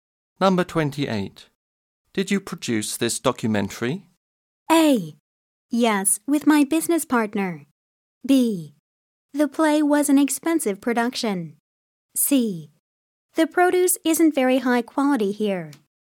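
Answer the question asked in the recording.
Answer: A: Yes, with my business partner.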